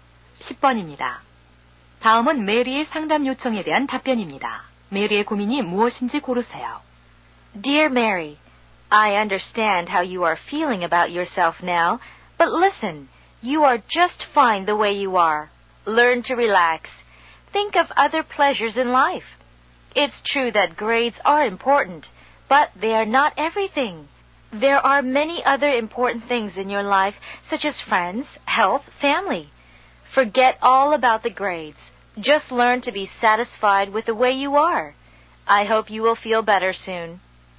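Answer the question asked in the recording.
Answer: 성적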